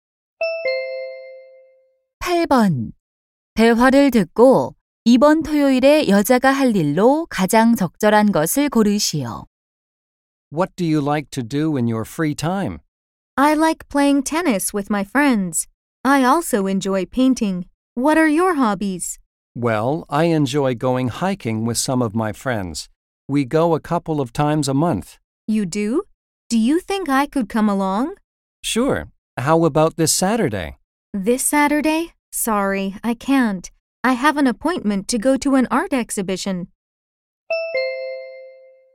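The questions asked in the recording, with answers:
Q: 대화를 듣고 이번 토요일에 여자가 할 일로 가장 적절한 것을 고르시오.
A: 미술 전시회 가기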